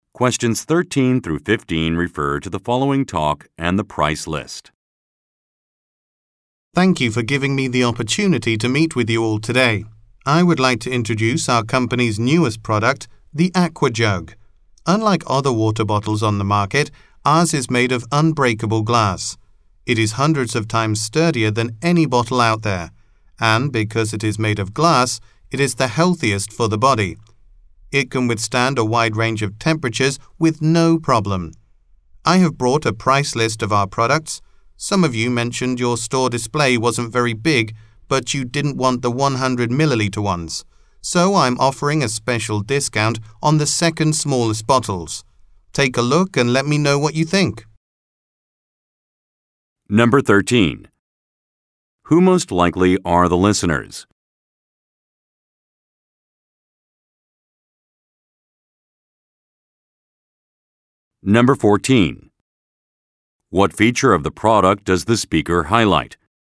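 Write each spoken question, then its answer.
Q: What feature of the product does the speaker highlight?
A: It is made of unbreakable glass (very sturdy)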